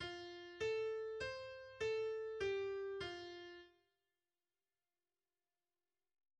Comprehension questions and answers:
Entscheide zuerst nur: Dur oder Moll?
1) Dur oder Moll?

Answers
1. F-Dur